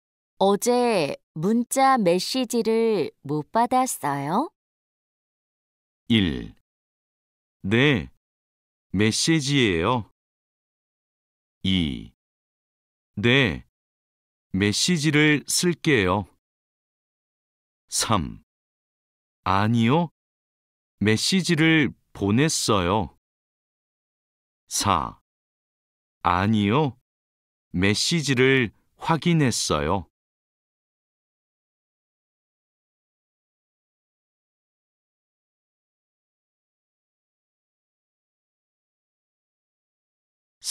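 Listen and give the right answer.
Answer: 4: 아니요, 메시지를 확인했어요.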